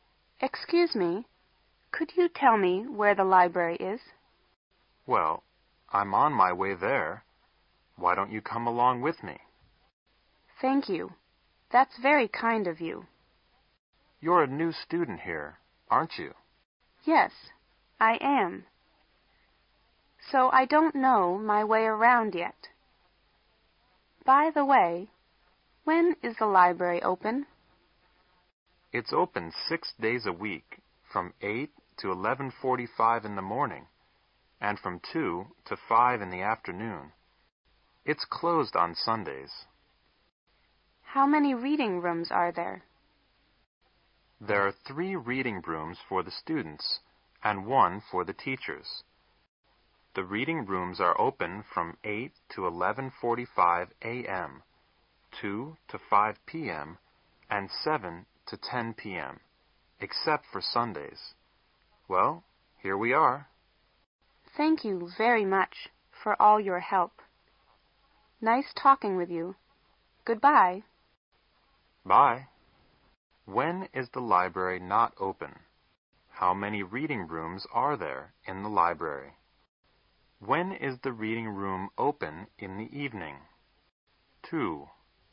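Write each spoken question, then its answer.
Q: When is the library not open?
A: On Sundays

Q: How many reading rooms are there in the library?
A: Four: 3 for students and 1 for teachers

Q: When is the reading room open in the evening?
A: From 7 to 10 p.m.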